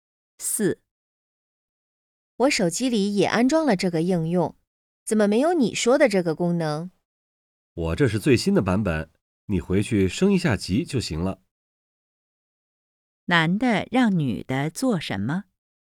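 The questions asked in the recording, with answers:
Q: 男的让女的做什么?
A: 升级应用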